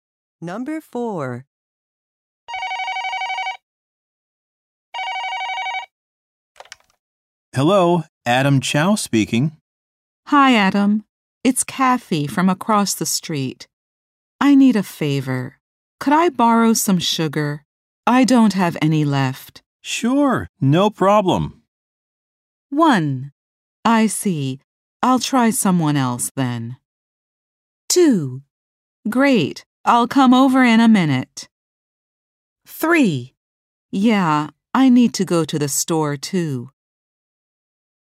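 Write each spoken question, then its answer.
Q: Sure, no problem.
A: 2: Great. I'll come over in a minute.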